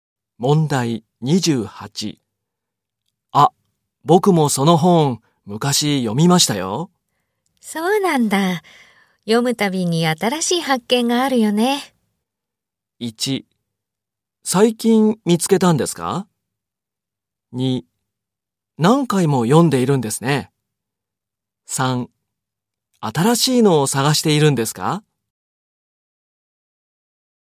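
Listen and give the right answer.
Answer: 2: 何回も読んでいるんですね。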